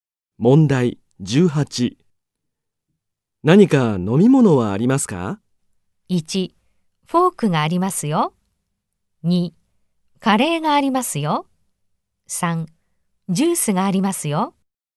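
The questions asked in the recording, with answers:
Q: 何か飲み物はありますか?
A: 3: ジュースがありますよ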